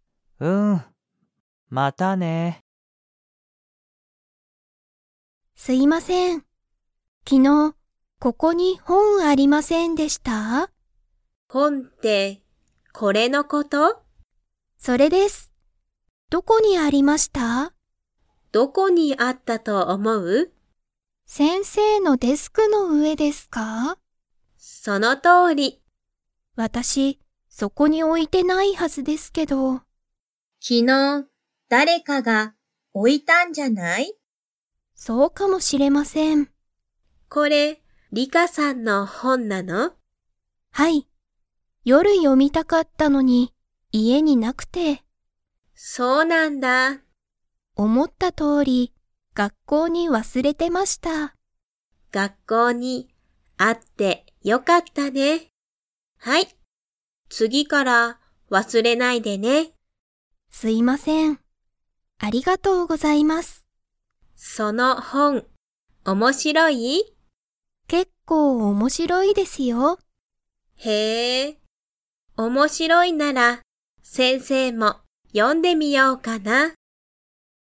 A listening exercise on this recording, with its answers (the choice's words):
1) リカは、その本ほんをデスクの上うえに置おきましたか?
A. はい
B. いいえ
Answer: いいえ

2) リカは____、その本ほんを読よみたかった。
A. 毎日まいにち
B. 夜よる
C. 次つぎから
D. いつも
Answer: 夜よる

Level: Level 2